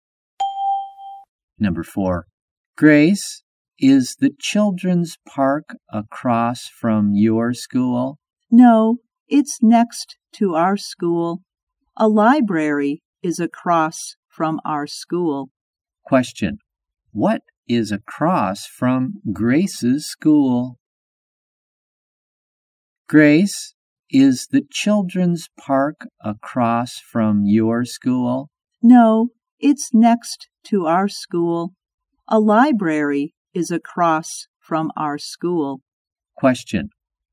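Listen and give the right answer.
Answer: A library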